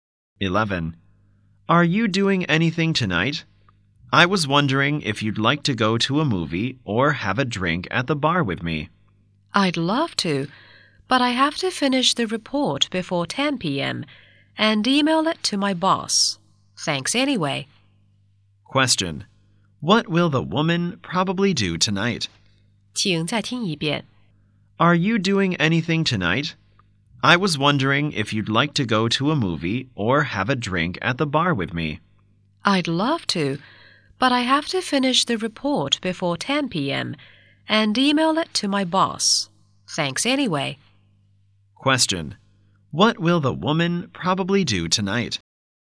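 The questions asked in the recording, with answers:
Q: What will the woman probably do tonight?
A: Finish the report and email it to her boss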